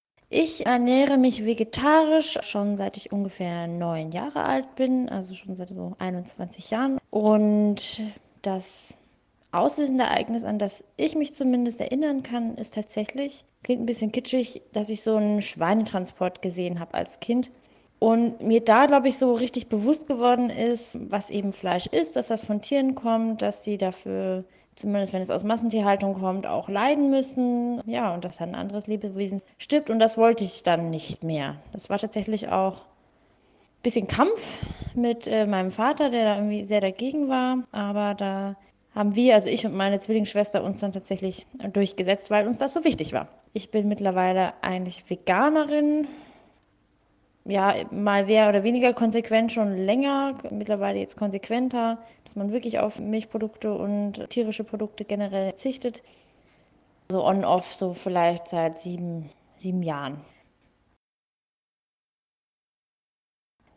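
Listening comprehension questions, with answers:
So hat seine/ihre Familie darauf reagiert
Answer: Ihr Vater war sehr dagegen, es gab einen Kampf, aber sie und ihre Zwillingsschwester haben sich durchgesetzt.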